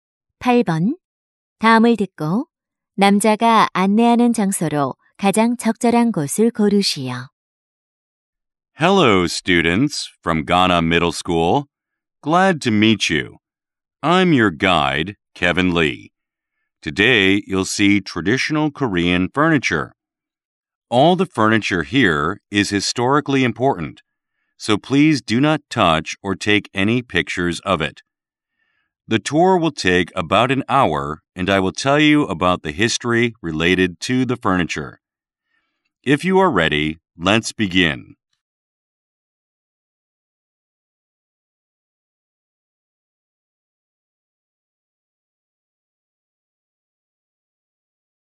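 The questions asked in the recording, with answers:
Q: 다음을 듣고 남자가 안내하는 장소로 가장 적절한 곳을 고르시오.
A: 박물관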